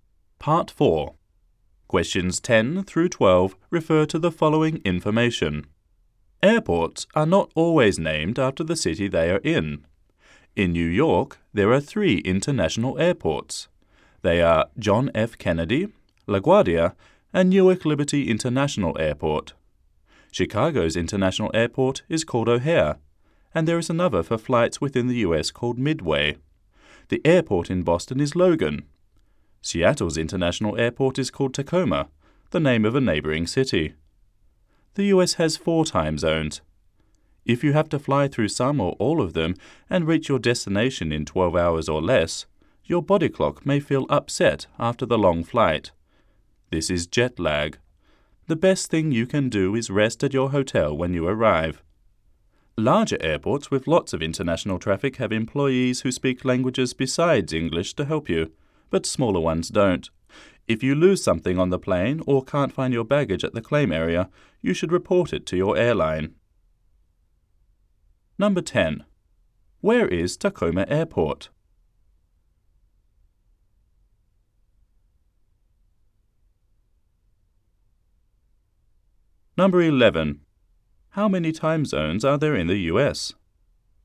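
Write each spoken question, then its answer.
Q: Where is Tacoma Airport?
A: In Seattle

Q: How many time zones are there in the US?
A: Four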